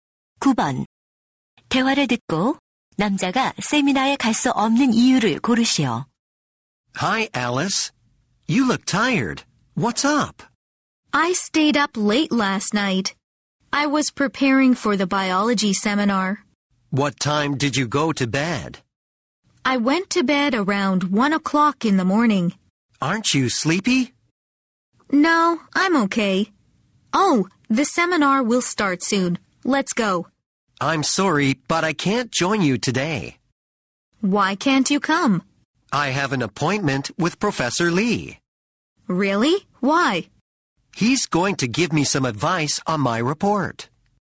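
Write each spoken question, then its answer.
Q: 대화를 듣고 남자가 세미나에 갈 수 없는 이유를 고르시오.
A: 리 교수님과 약속이 있어서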